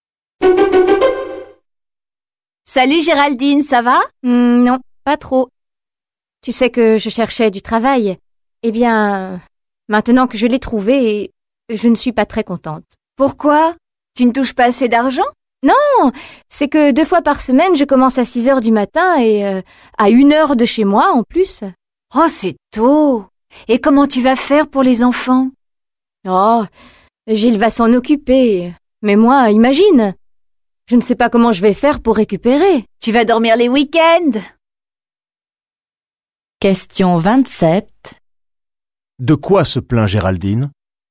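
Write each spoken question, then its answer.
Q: De quoi se plaint Géraldine?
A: De ses horaires: commencer à 6h deux fois par semaine, loin de chez elle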